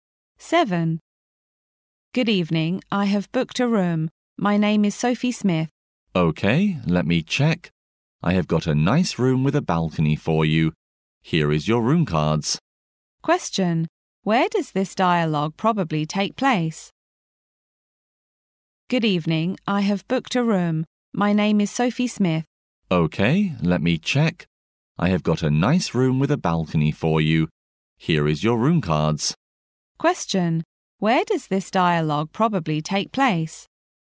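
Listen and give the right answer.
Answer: In a hotel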